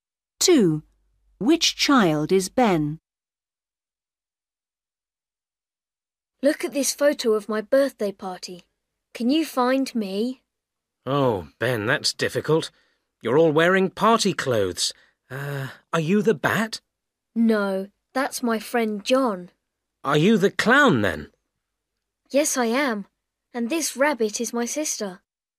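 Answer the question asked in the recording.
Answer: The clown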